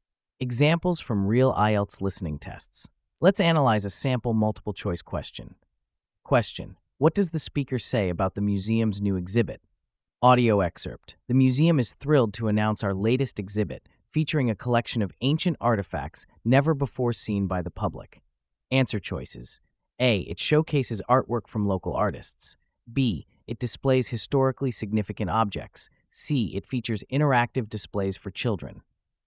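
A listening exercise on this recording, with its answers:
What does the speaker say about the museum's new exhibit?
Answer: It displays historically significant objects.

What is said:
Examples from Real IELTS Listening Tests
Let's analyze a sample multiple-choice question:
Question: What does the speaker say about the museum's new exhibit?
Audio Excerpt: "The museum is thrilled to announce our latest exhibit, featuring a collection of ancient artifacts never before seen by the public."
Answer Choices: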